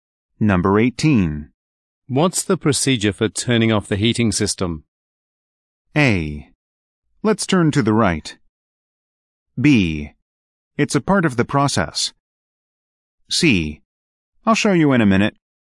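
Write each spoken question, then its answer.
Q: What's the procedure for turning off the heating system?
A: C: I'll show you in a minute.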